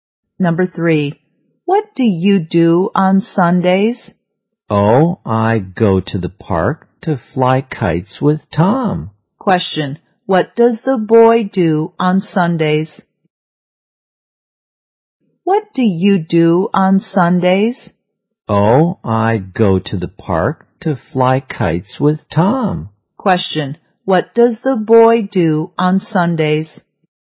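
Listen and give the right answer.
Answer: He flies kites in the park with Tom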